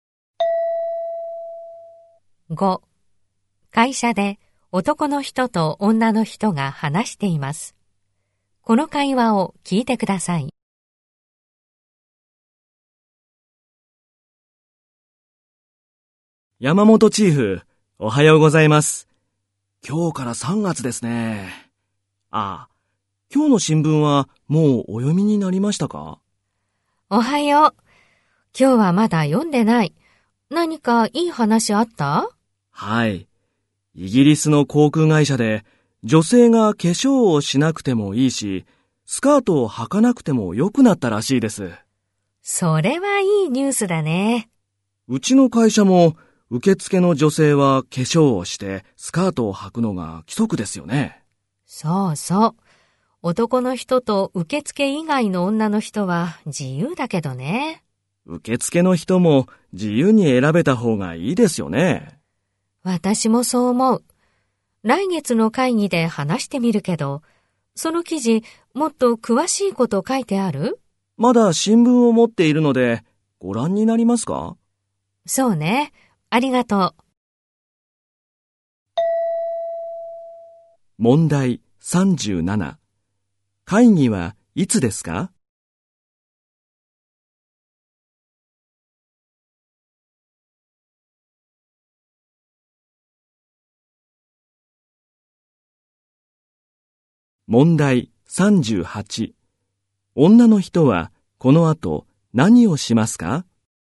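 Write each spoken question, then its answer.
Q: 会議はいつですか?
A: 来月(4月)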